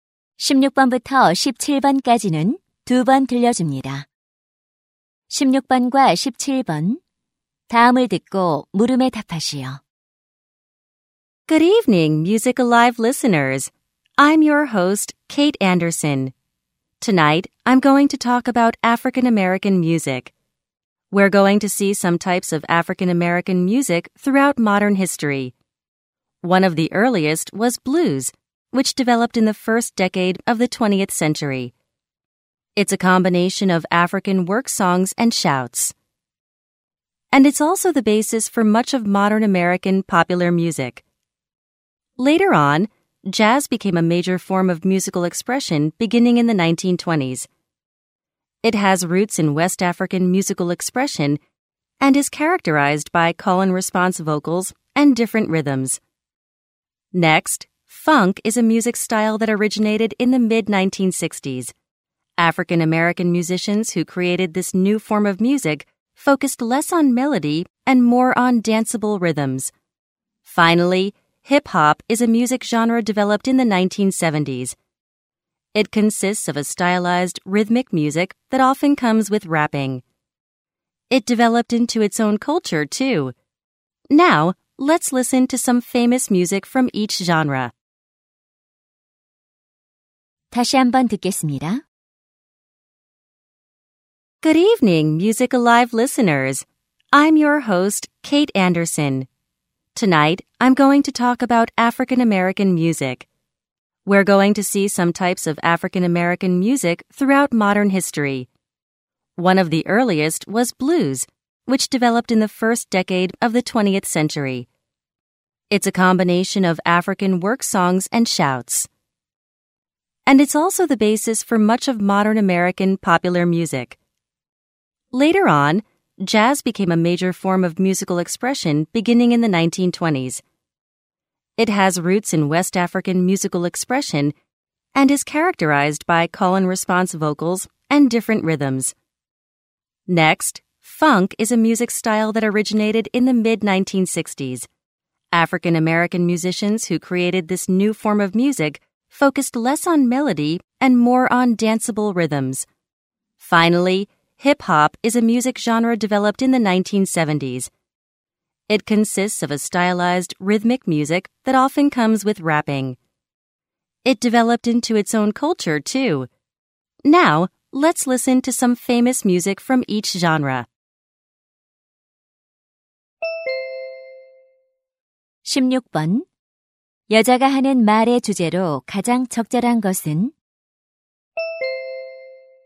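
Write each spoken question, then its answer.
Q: 여자가 하는 말의 주제로 가장 적절한 것은?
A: 근현대사 속 아프리카계 미국인 음악의 종류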